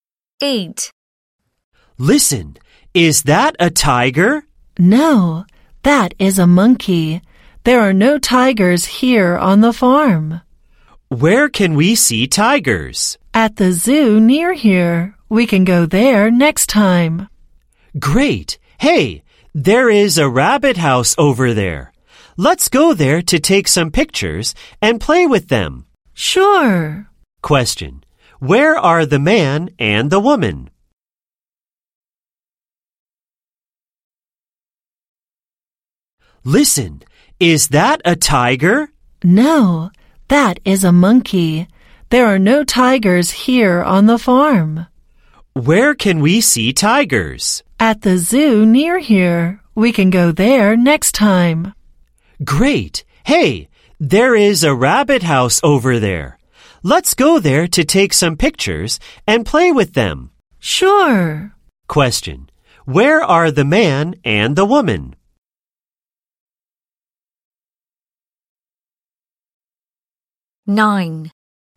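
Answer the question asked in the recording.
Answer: On a farm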